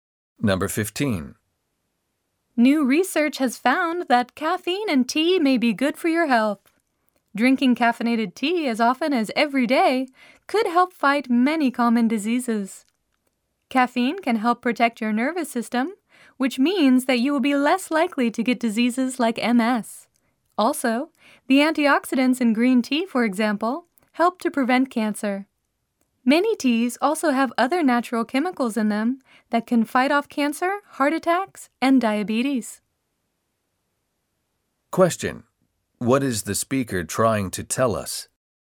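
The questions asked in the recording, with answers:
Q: What is the speaker trying to tell us?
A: Caffeinated tea may be good for your health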